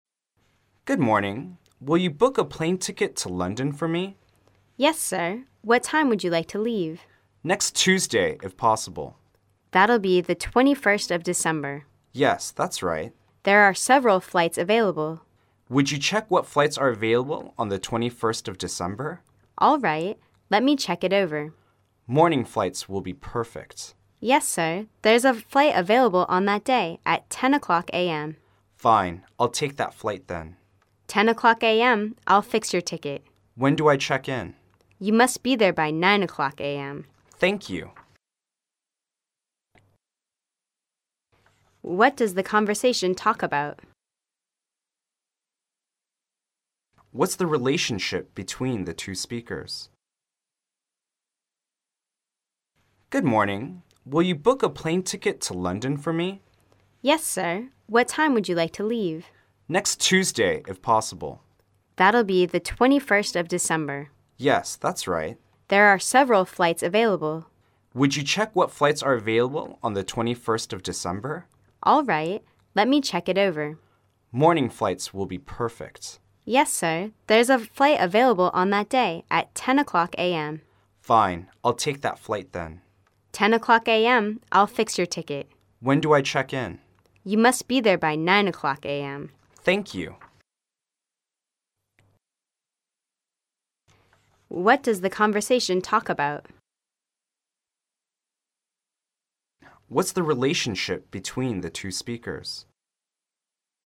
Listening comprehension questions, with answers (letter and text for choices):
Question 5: What's the relationship between the two speakers?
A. Wife and husband.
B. Teacher and student.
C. Clerk and guest.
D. Employer and employee.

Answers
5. C. Clerk and guest.

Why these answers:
该题为推理判断题,根据上一题的信息可推知他两是客户与代理人之间的关系。